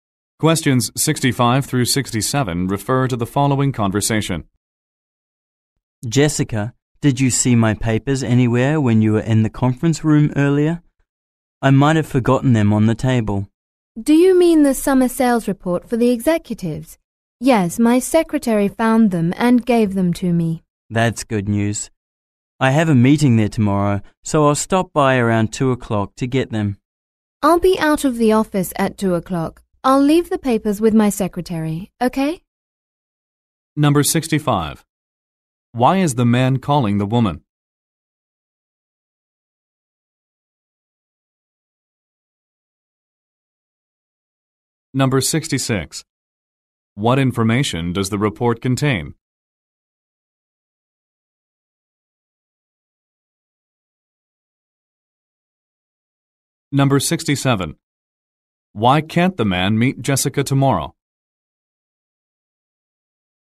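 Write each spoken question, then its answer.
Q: What information does the report contain?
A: Summer sales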